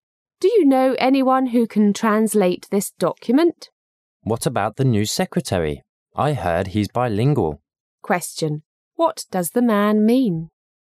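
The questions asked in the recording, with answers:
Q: What does the man mean?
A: The new secretary may be able to translate the document.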